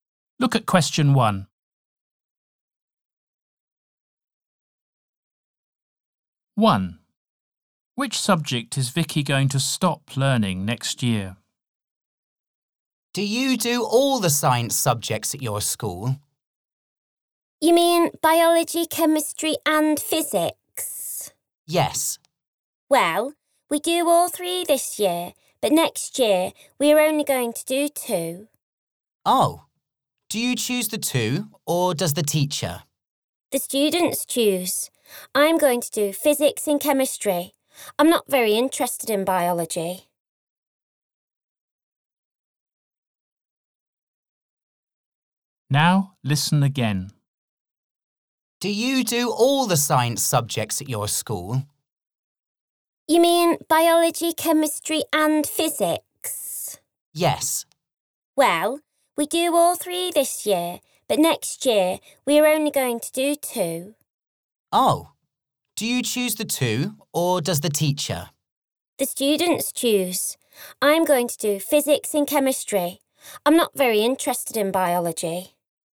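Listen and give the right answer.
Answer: biology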